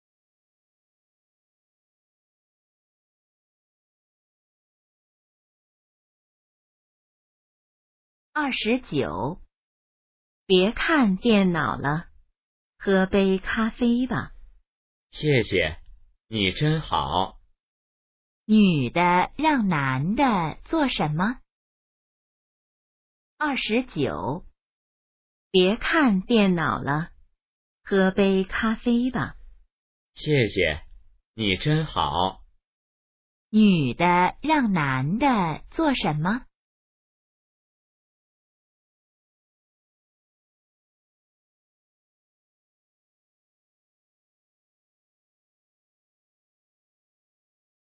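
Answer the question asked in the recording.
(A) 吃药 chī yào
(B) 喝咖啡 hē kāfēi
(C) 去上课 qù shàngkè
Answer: (B) 喝咖啡 hē kāfēi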